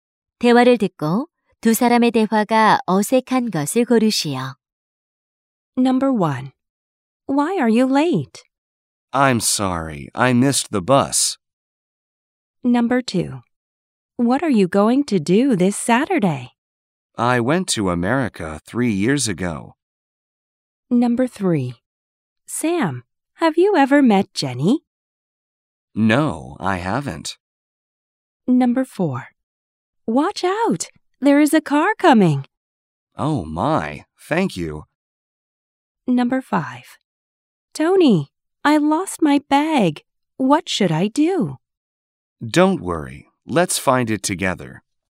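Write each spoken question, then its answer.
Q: 대화를 듣고 두 사람의 대화가 어색한 것을 고르시오.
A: 2번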